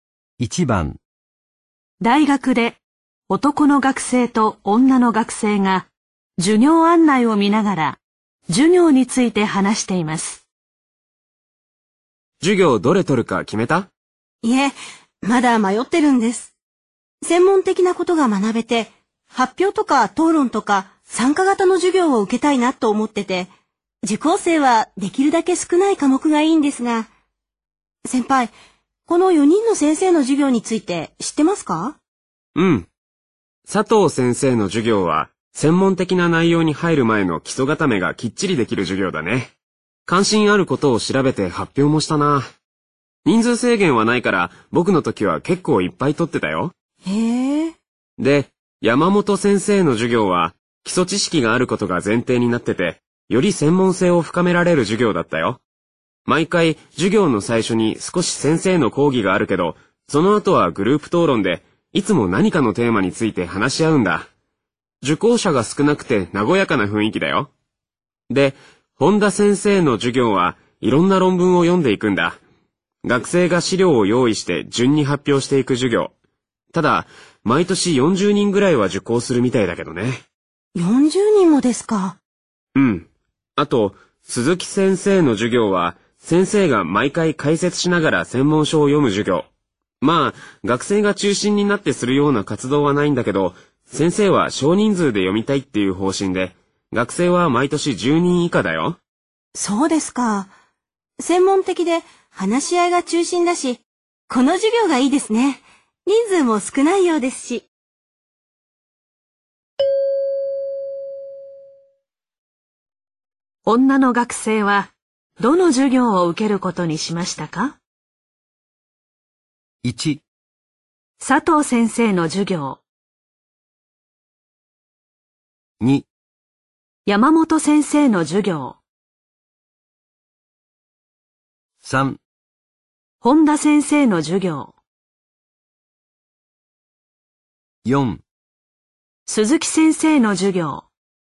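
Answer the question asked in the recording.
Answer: 2: 山本先生の授業。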